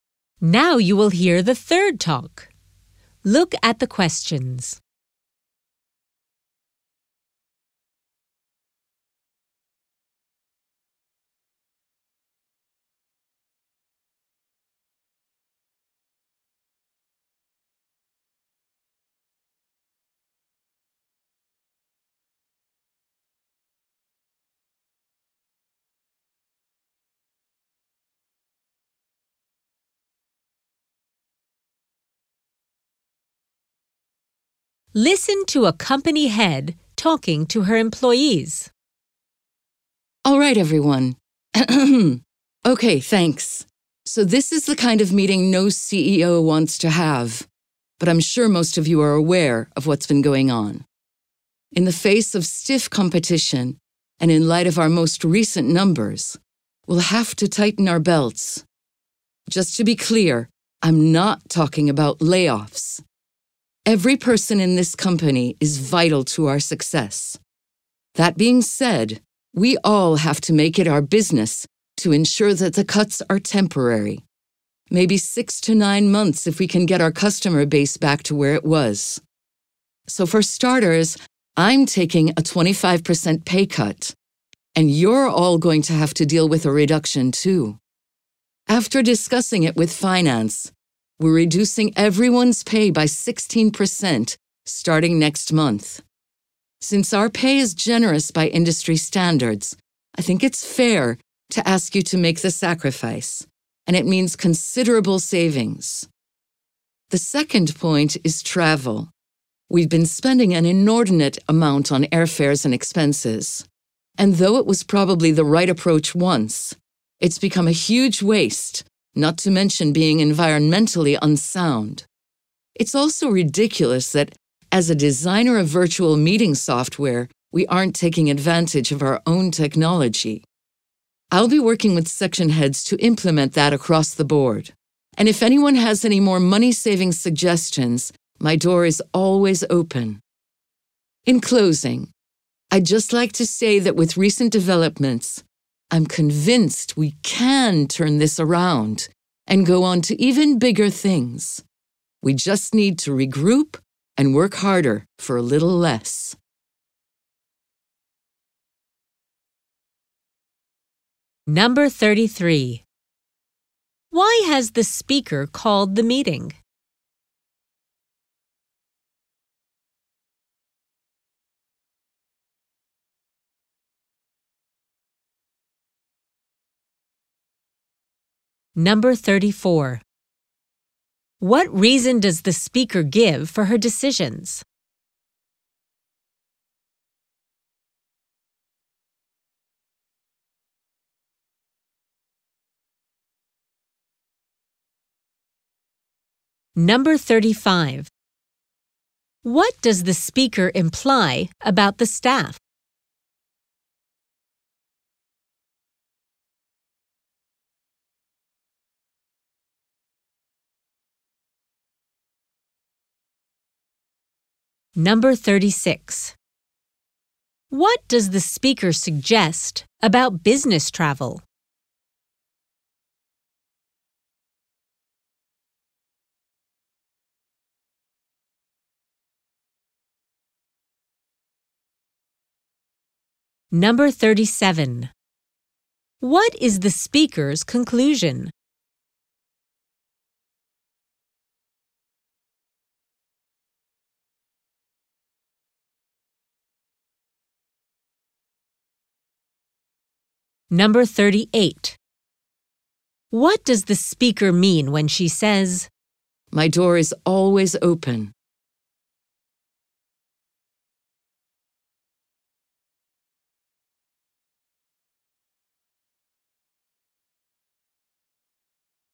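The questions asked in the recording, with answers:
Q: Why has the speaker called the meeting?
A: To announce cost-cutting measures

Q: What reason does the speaker give for her decisions?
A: Stiff competition and poor recent numbers

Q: What does the speaker suggest about business travel?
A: It should be replaced by virtual meetings

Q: What is the speaker's conclusion?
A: She is optimistic the company can turn things around

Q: What does the speaker mean when she says,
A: She welcomes suggestions from employees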